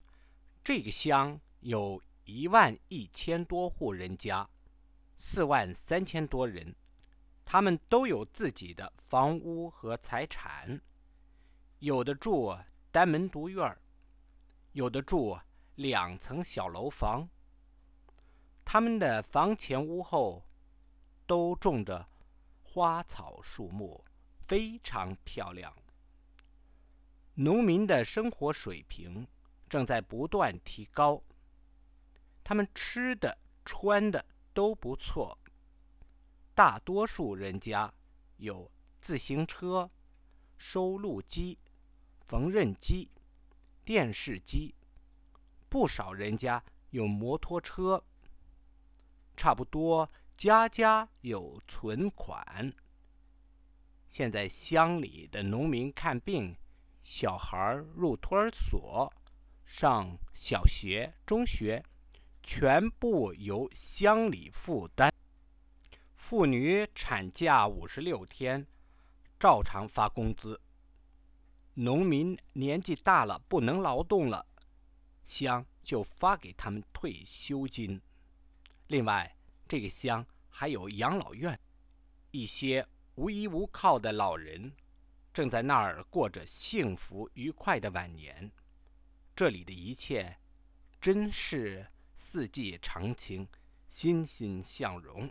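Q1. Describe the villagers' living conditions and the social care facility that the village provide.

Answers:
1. They own houses (single courtyards or two-storey buildings) with gardens, and most have bicycles, TVs and savings. The village pays for medical care, nursery and school; women get 56 days of paid maternity leave; the elderly get pensions, and there is a home for old people.

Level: Second year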